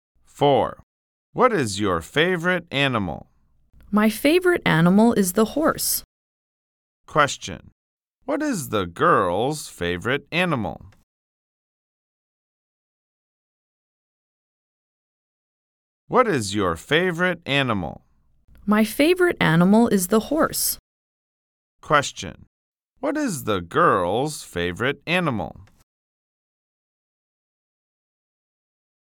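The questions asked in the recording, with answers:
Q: What is the girl's favorite animal?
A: The horse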